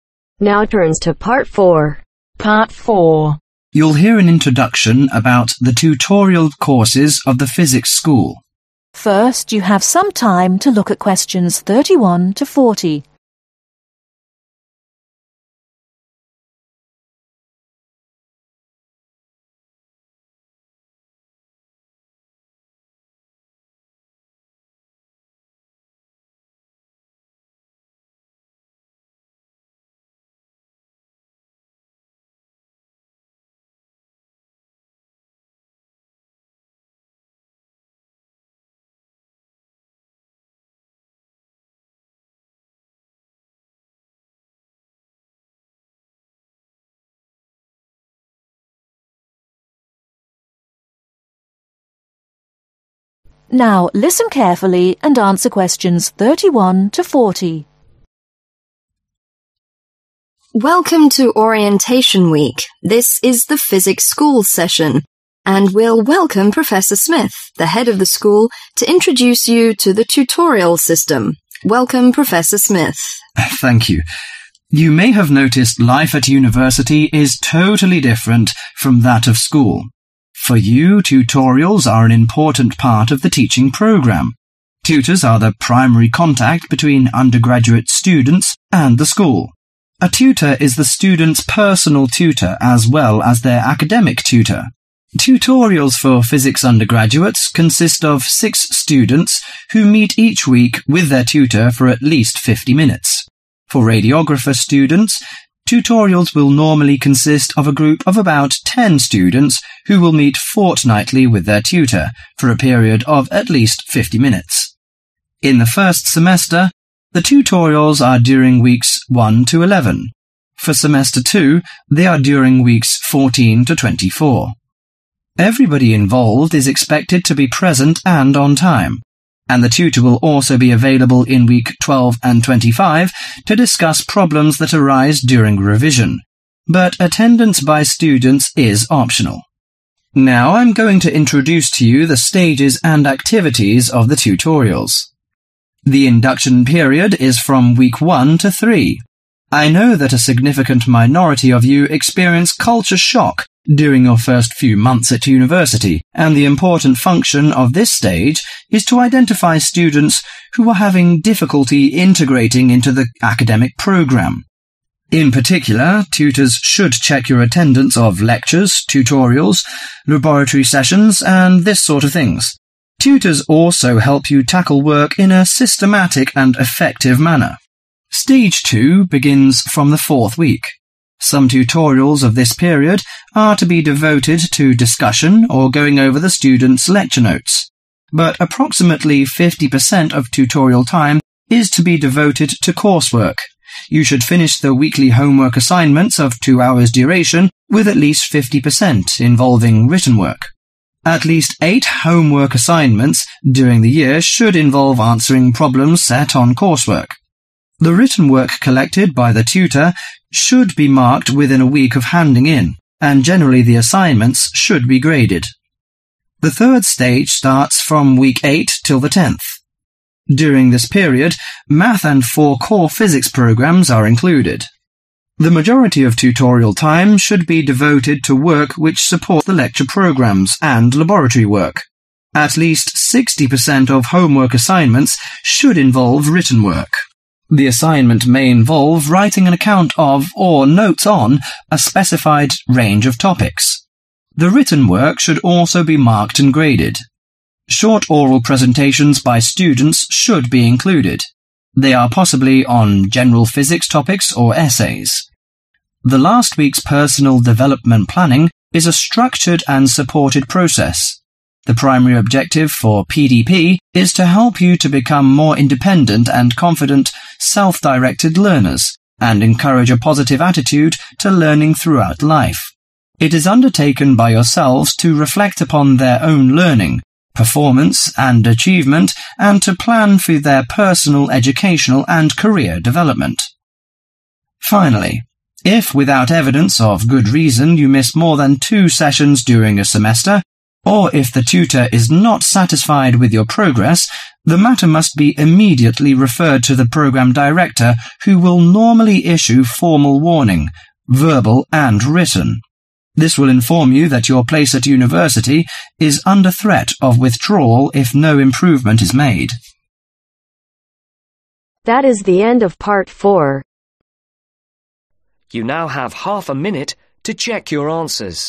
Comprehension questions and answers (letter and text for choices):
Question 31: According Prof. Smith, a tutor ..... .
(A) is an important part of teaching program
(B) is responsible for students' academic problems only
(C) instructs students in personal and academic problems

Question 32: The pattern of tutorials for radiography students is the meet between the tutor and .... .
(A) a group of 6 students weekly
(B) a group of 10 students weekly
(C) a group of 10 students every two weeks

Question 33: The tutorials in the 12th and 25th week is ..... .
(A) without the presence of the tutor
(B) selective for students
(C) compulsory to everybody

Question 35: help solving work in a (35)............ and effective way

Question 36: half tutorials deal with (36)............ work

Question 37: weekly assignments for (37)............ hours with 50% of written work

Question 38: collect the written work and (38)............ and grade them in one week.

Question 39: supporting work about (39)............ programs and lab work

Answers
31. (C) instructs students in personal and academic problems
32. (C) a group of 10 students every two weeks
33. (B) selective for students
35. Systematic
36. Course
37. Two
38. Mark
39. Lecture